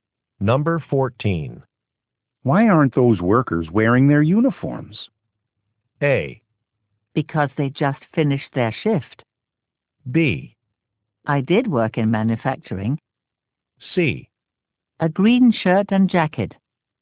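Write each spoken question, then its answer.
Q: Why aren't those workers wearing their uniforms?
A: A: Because they just finished their shift.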